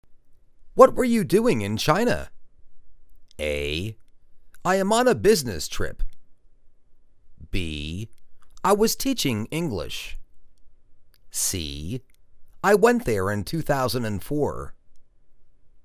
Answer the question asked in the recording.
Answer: I was teaching English.